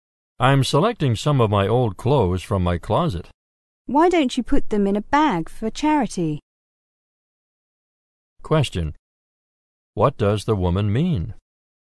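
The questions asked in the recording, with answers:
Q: What does the woman mean?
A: He should give the old clothes to charity.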